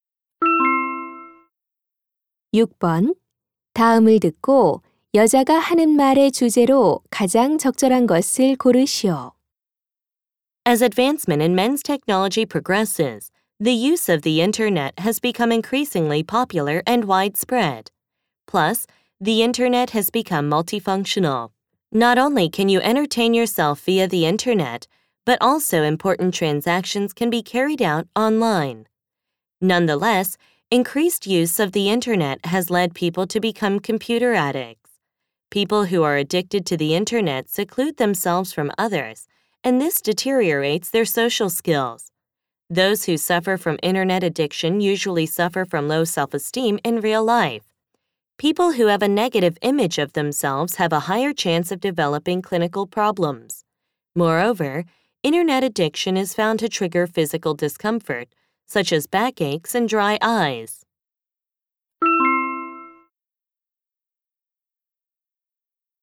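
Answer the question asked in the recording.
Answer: 인터넷 중독의 부정적 영향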